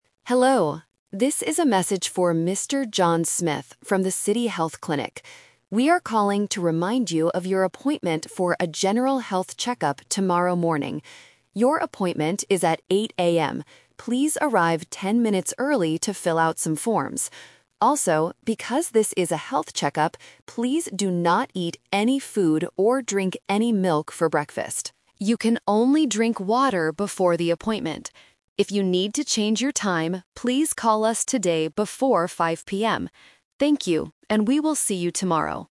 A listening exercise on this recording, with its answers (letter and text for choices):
Listen to the voicemail and choose the correct answer (A, B, or C).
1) What time is John's health check-up?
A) 8:00 AM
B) 10:00 AM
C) 5:00 PM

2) What must John do before his appointment?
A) He must eat a big breakfast.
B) He must drink some milk.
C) He must not eat any food.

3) What should John do if he wants to change his appointment time?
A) Arrive ten minutes early.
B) Call the clinic today.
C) Fill out some forms.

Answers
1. A) 8:00 AM
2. C) He must not eat any food.
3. B) Call the clinic today.

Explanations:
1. The staff says, "Your appointment is at 8:00 AM." Option (C) is a trap because 5:00 PM is the deadline to call the clinic if he wants to change the time. Option (B) is a trap because the audio mentions "ten minutes," which might confuse students listening for numbers.
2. The voicemail strictly says, "please do not eat any food". Option (A) is the exact opposite of the instruction. Option (B) is a trap because the word "milk" is mentioned, but the instruction is "do not... drink any milk".
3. The staff says, "If you need to change your time, please call us today before 5:00 PM." Options (A) and (C) are traps because arriving early and filling out forms are things he must do for the check-up itself, not for changing the time.

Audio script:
Clinic Staff (Voicemail): Hello, this is a message for Mr. John Smith from the City Health Clinic. We are calling to remind you of your appointment for a general health check-up tomorrow morning. Please arrive ten minutes early to fill out some forms. Also, because this is a health check-up, please do not eat any food or drink any milk for breakfast. You can only drink water before the appointment. If you need to change your time, please call us today before 5:00 PM. Thank you, and we will see you tomorrow.

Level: A2